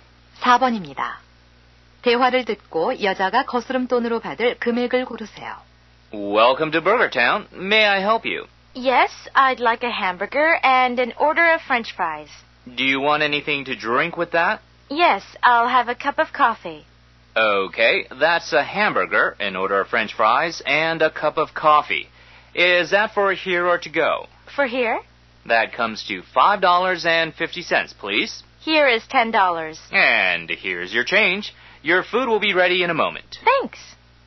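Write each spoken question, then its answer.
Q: 대화를 듣고 여자가 거스름돈으로 받을 금액을 고르세요.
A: 4달러 50센트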